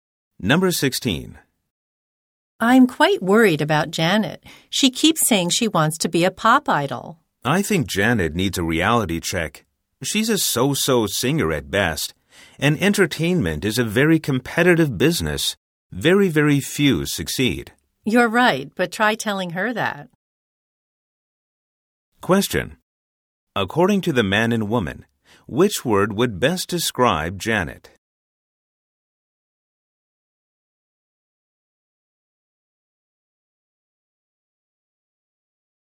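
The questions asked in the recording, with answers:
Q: According to the man and woman, which word would best describe Janet?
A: Unrealistic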